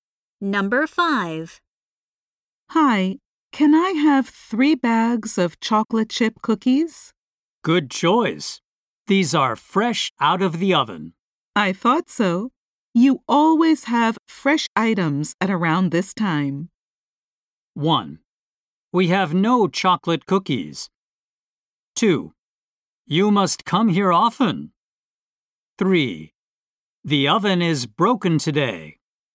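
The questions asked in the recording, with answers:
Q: I thought so. You always have fresh items at around this time.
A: 2: You must come here often.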